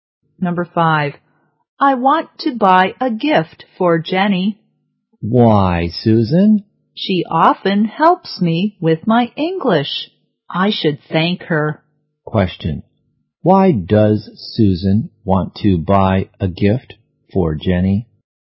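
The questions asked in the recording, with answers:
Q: why does Susan want to buy a gift for Jenny?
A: To thank her for helping with English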